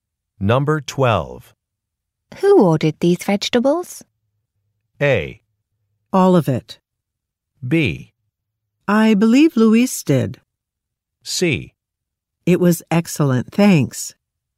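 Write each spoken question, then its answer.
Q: Who ordered these vegetables?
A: B: I believe Luis did.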